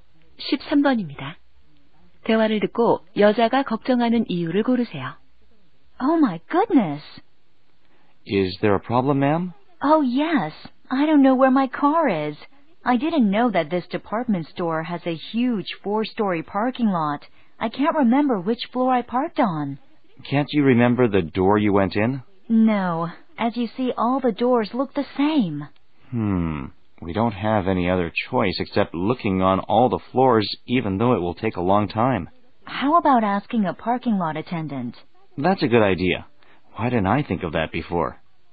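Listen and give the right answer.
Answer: 주차한 차를 찾을 수 없어서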